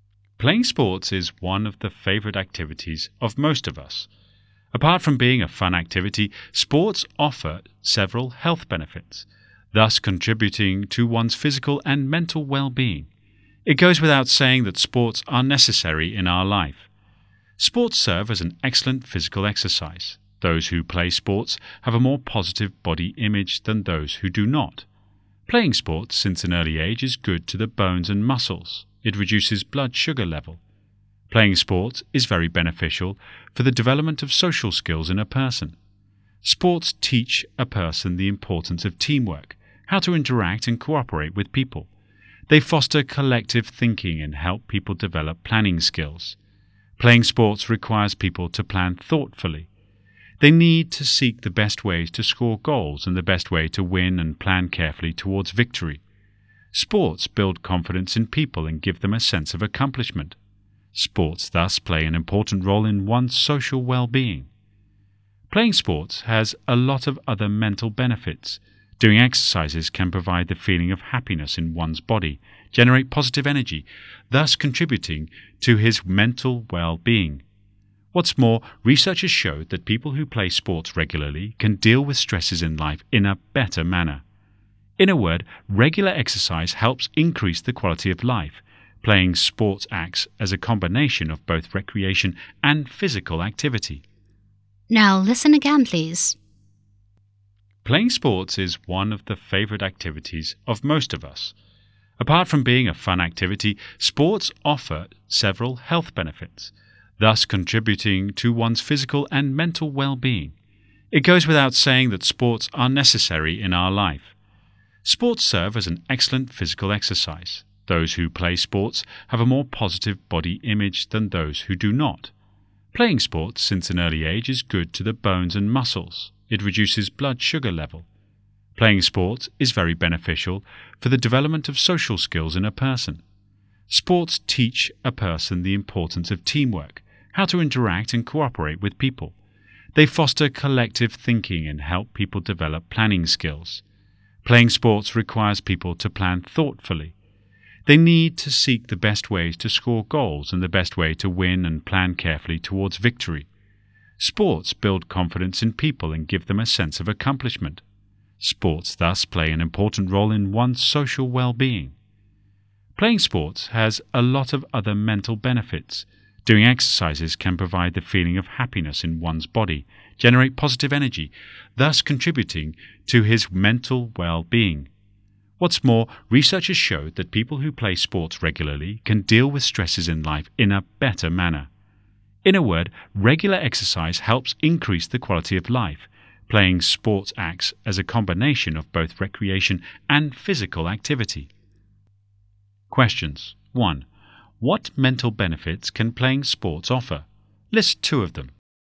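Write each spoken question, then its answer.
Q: What mental benefits can playing sports offer?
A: It makes people feel happy and gives positive energy, and it helps them handle stress better.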